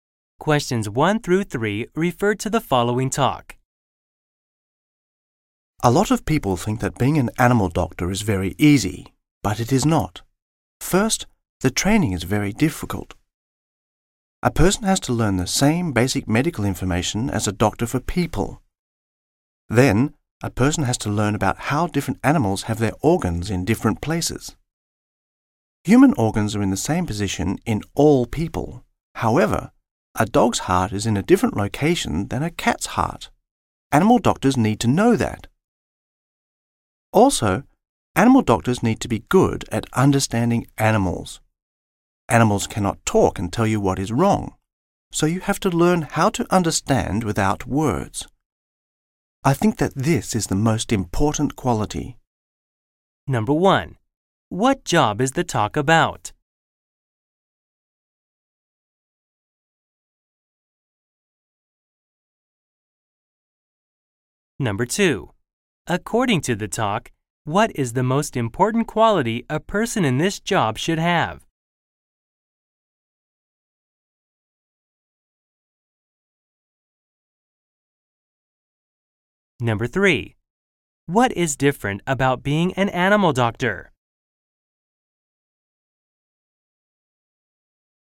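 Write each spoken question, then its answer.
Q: What job is the talk about?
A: Animal doctor (veterinarian)

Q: According to the talk, what is the most important quality a person in this job should have?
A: Being good at understanding animals without words

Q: What is different about being an animal doctor?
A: Different animals have their organs in different places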